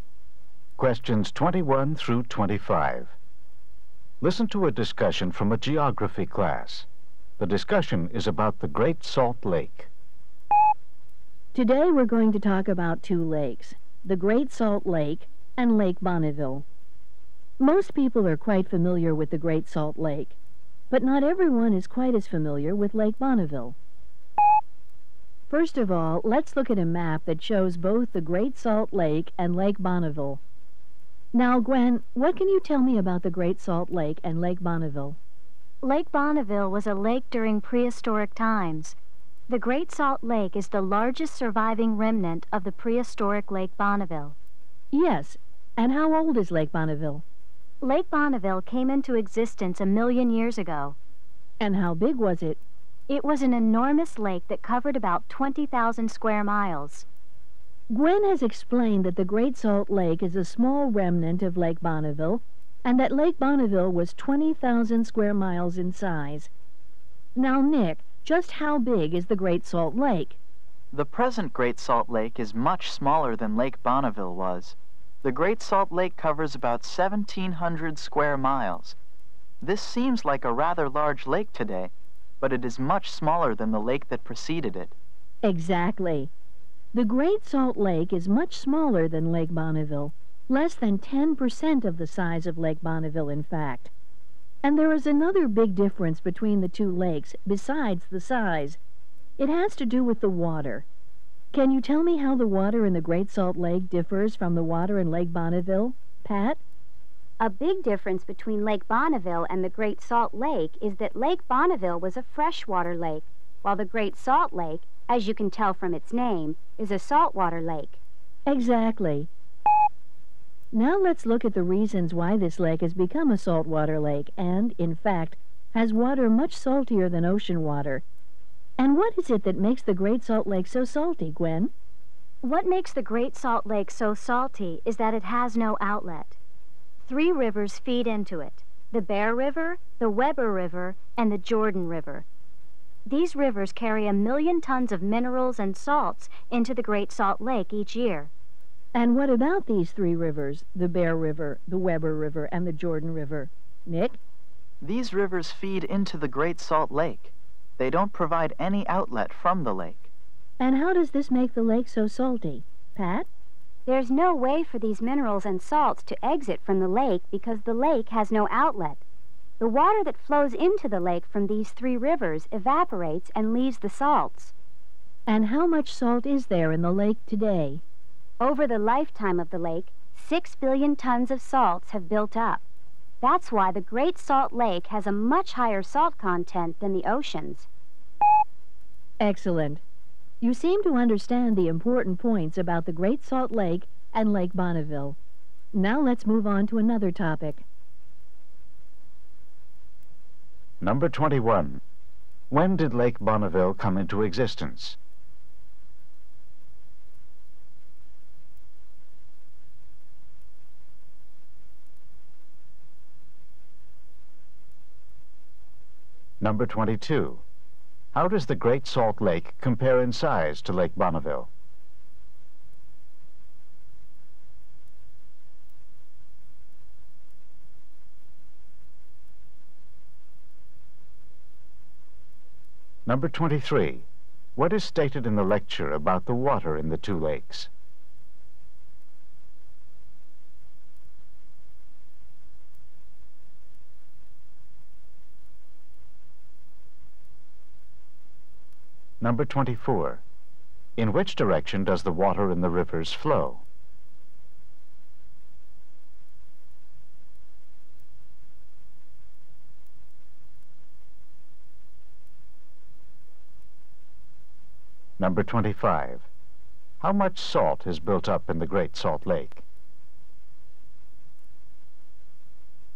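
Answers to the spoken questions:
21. 1 million years ago
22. It is less than 10% of its size
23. Lake Bonneville was fresh water; the Great Salt Lake is salt water
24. Into the Great Salt Lake
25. 6 billion tons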